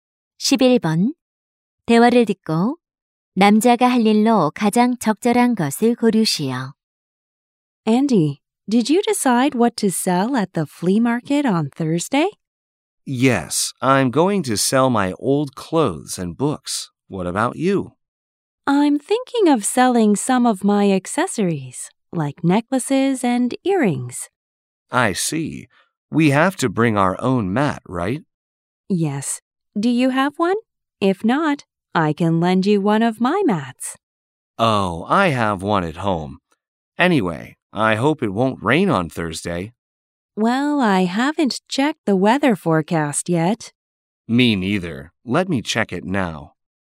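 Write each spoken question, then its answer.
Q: 대화를 듣고 남자가 할 일로 가장 적절한 것을 고르시오.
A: 일기 예보 확인하기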